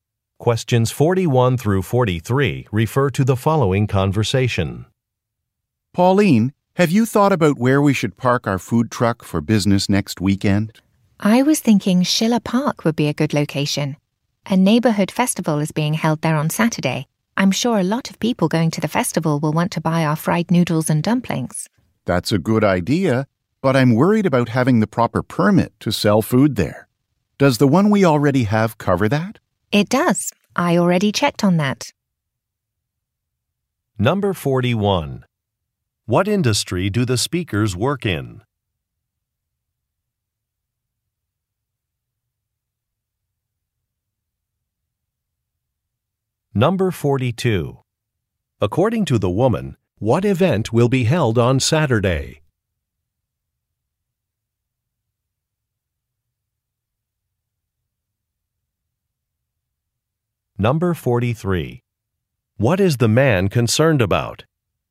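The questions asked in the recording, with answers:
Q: What industry do the speakers work in?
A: Food service (a food truck)

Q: What event will be held on Saturday?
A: A neighborhood festival

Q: What is the man concerned about?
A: Having the proper permit to sell food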